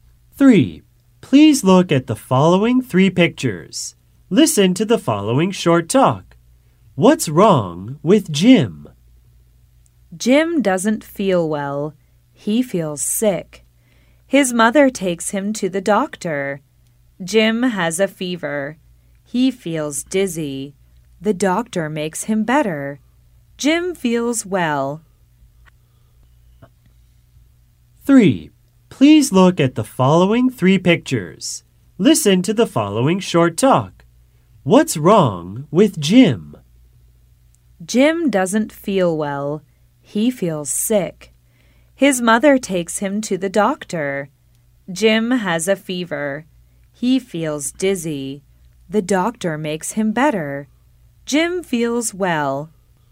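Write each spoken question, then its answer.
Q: What's wrong with Jim?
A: He has a fever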